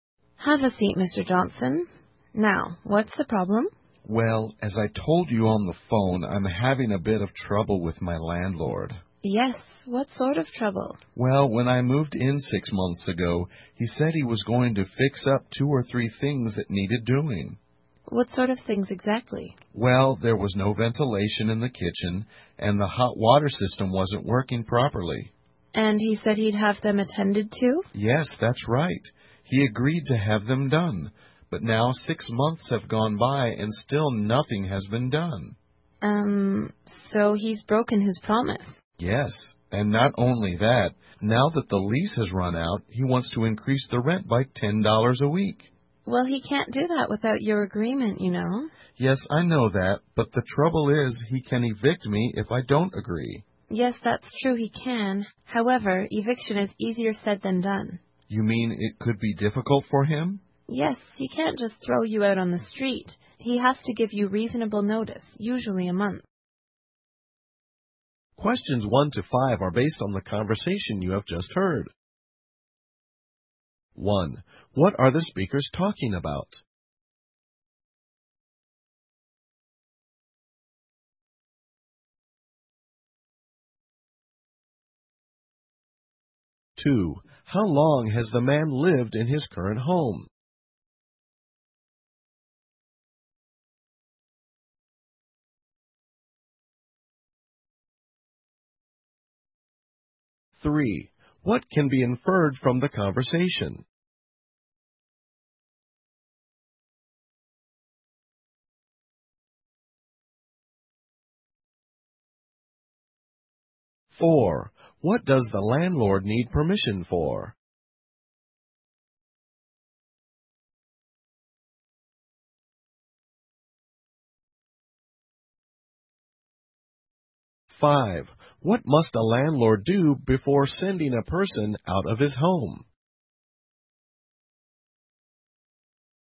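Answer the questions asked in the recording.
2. 6 months
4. To raise the rent by $10 a week
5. Give reasonable notice, usually a month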